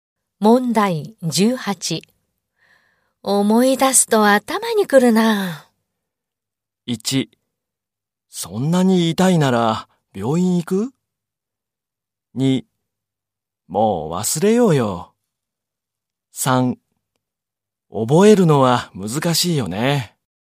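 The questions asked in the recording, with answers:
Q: 思い出すと頭にくるな。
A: 2: もう忘れようよ。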